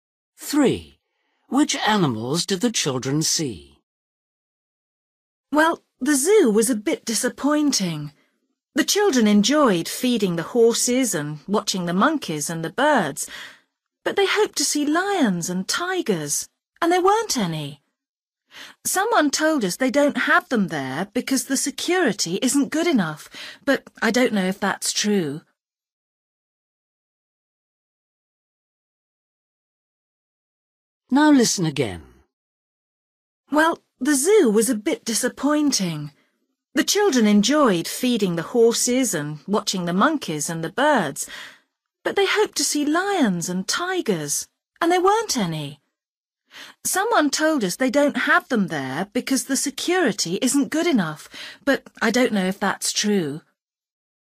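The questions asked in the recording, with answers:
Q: Which animals did the children see?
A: horses, monkeys and birds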